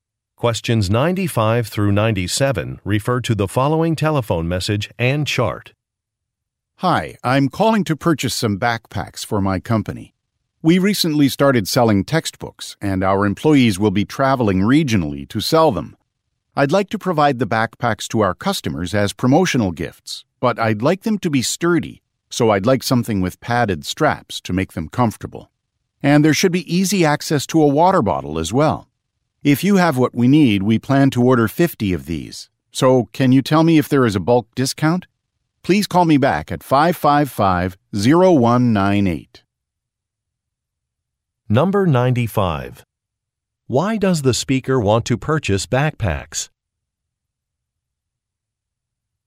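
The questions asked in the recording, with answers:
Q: Why does the speaker want to purchase backpacks?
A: To give to customers as promotional gifts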